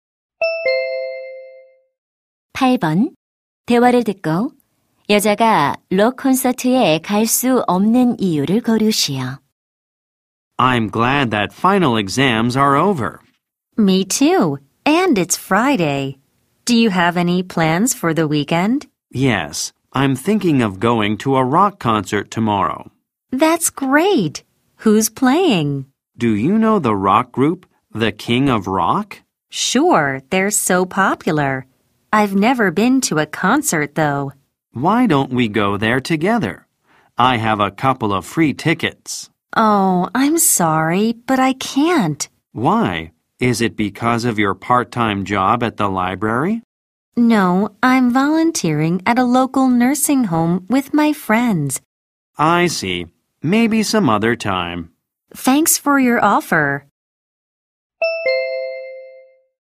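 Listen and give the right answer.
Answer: 요양원에서 자원봉사를 해야 해서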